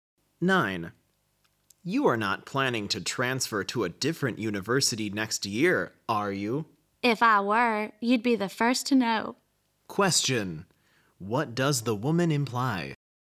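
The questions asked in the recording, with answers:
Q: What does the woman imply?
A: She isn't planning to transfer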